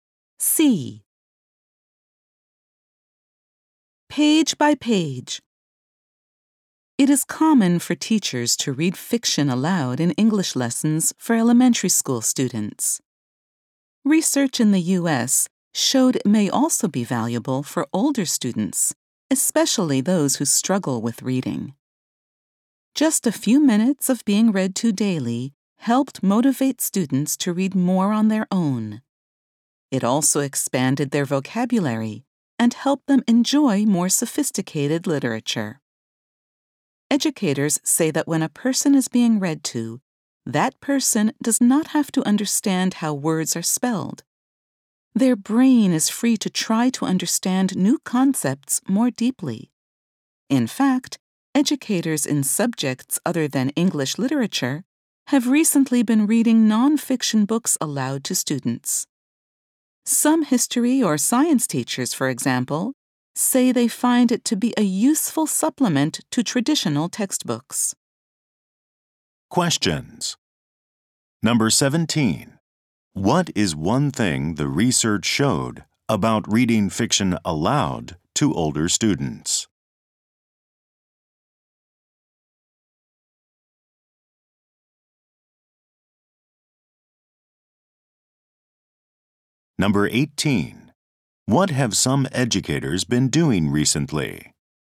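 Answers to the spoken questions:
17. It made them want to read more on their own.
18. Reading non-fiction books aloud in subjects like history and science.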